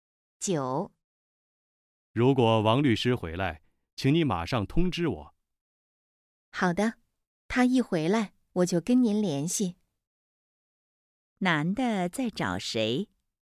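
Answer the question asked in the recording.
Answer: 王律师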